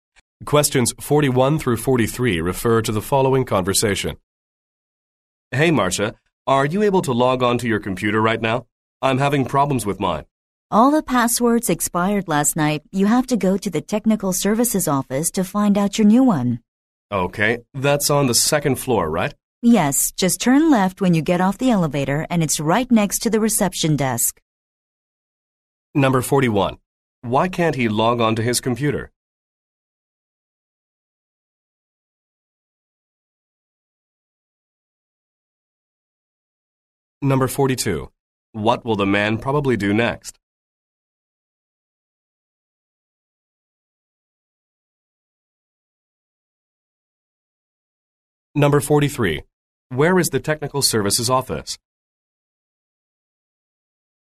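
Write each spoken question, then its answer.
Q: Why can't he log on to his computer?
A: All the passwords expired last night

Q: What will the man probably do next?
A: Go to the technical services office to get a new password

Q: Where is the technical services office?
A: On the second floor, next to the reception desk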